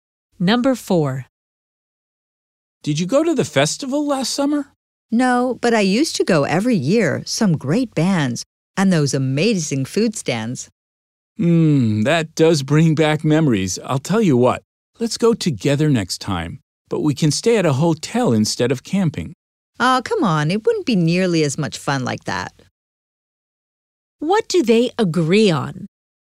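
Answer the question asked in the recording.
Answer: Going to the festival together next time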